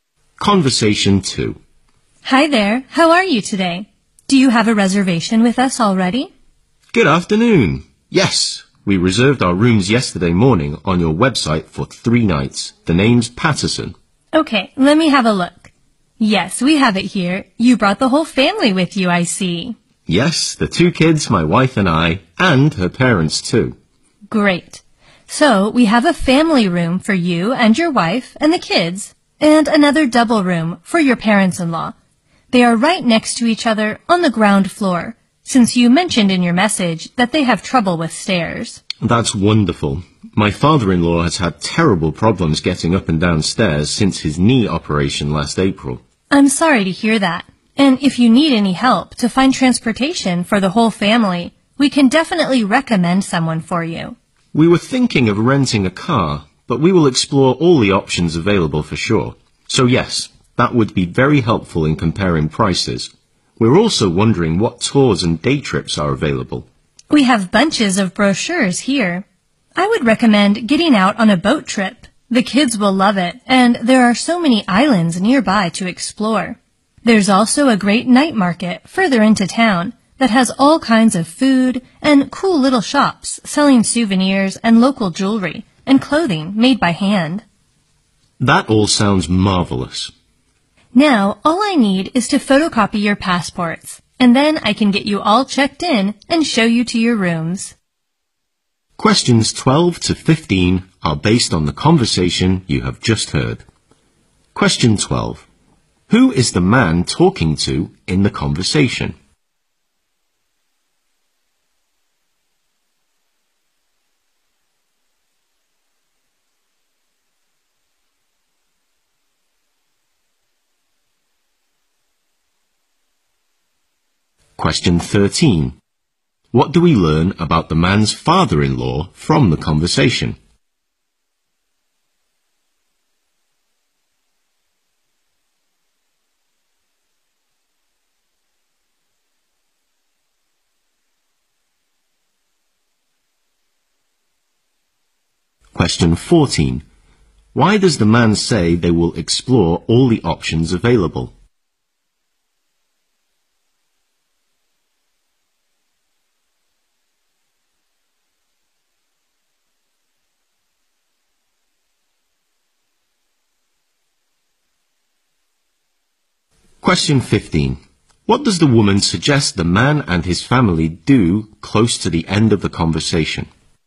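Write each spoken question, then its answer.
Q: Who is the man talking to in the conversation?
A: A hotel receptionist.

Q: What do we learn about the man's father-in-law from the conversation?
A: He has had trouble with stairs since his knee operation last April.

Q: Why does the man say they will explore all the options available?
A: To compare prices.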